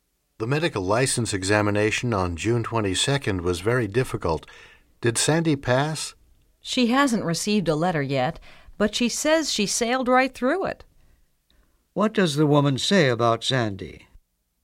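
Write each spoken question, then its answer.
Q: What does the woman say about Sandy?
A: She thinks she passed the exam easily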